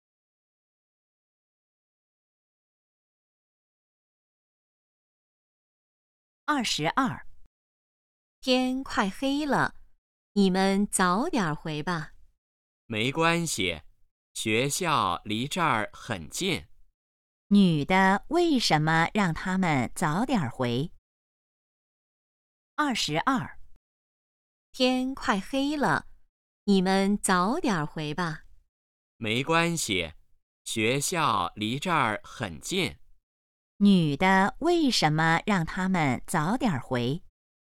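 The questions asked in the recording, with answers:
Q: 女的为什么让他们早点回?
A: 天快黑了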